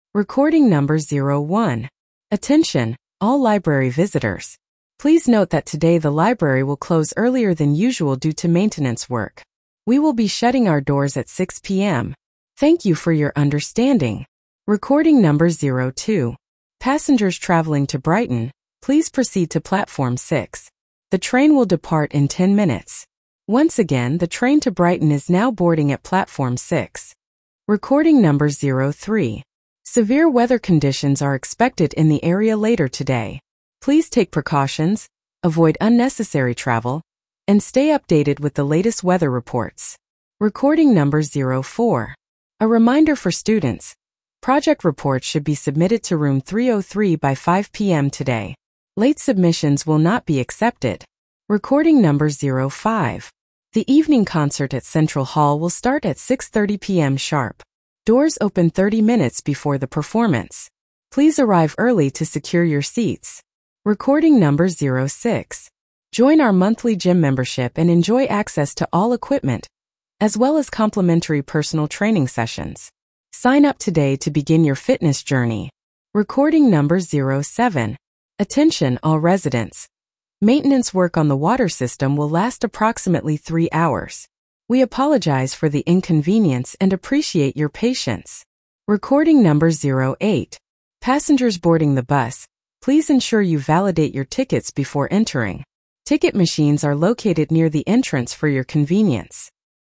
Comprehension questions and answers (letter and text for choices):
You will hear eight short announcements or instructions. There is one question for each announcement or instruction. For each question, choose the correct answer A, B, C, or D.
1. What time will the library close today?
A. 8:00 PM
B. 7:00 PM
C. 6:00 PM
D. 9:00 PM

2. Which platform does the train to Brighton depart from?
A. Platform 2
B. Platform 6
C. Platform 4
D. Platform 8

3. What is the main purpose of the announcement?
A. To warn about severe weather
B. To notify a road closure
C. To advertise a new event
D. To remind about safety regulations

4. Where should students submit their project reports?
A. Room 101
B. Room 303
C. Room 300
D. Room 404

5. What time does the concert start?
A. 5:30 PM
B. 6:00 PM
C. 6:30 PM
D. 7:00 PM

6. What is included in the monthly gym membership?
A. Free yoga classes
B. Free swimming lessons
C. Complimentary personal training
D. Access to exclusive use of workout equipment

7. How long will the maintenance work last?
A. 1 hour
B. 2 hours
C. 4 hours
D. 3 hours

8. What should passengers do before boarding the bus?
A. Validate their tickets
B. Show their ID cards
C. Check the seating chart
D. Confirm their destination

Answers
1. C. 6:00 PM
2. B. Platform 6
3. A. To warn about severe weather
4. B. Room 303
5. C. 6:30 PM
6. C. Complimentary personal training
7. D. 3 hours
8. A. Validate their tickets

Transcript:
"Attention, all library visitors. Please note that today the library will close earlier than usual due to maintenance work. We will be shutting our doors at 6:00 PM. Thank you for your understanding."
"Passengers traveling to Brighton, please proceed to Platform 6. The train will depart in 10 minutes. Once again, the train to Brighton is now boarding at Platform 6."
"Severe weather conditions are expected in the area later today. Please take precautions, avoid unnecessary travel, and stay updated with the latest weather reports."
"A reminder for students: project reports should be submitted to Room 303 by 5:00 PM today. Late submissions will not be accepted."
5. "The evening concert at Central Hall will start at 6:30 PM sharp. Doors open 30 minutes before the performance. Please arrive early to secure your seats."
6. "Join our monthly gym membership and enjoy access to all equipment, as well as complimentary personal training sessions. Sign up today to begin your fitness journey!"
"Attention, all residents: maintenance work on the water system will last approximately 3 hours. We apologize for the inconvenience and appreciate your patience."
"Passengers boarding the bus, please ensure you validate your tickets before entering. Ticket machines are located near the entrance for your convenience."

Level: VSTEP B1